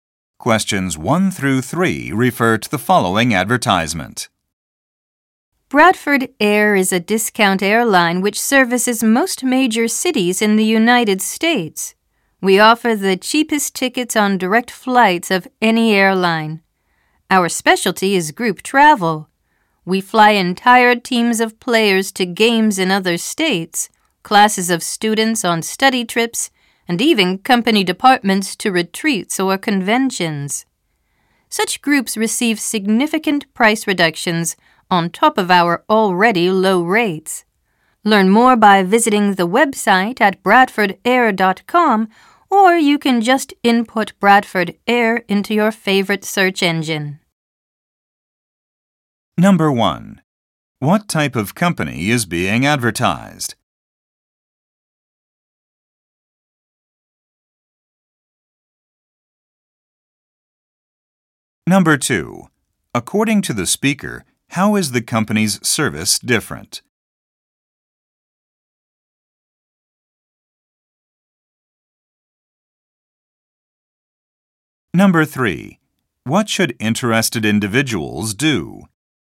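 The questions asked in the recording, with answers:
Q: What type of company is being advertised?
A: An airline

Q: What should interested individuals do?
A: Visit the website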